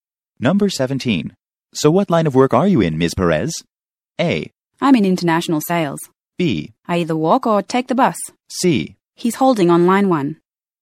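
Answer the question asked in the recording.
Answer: A: I'm in international sales.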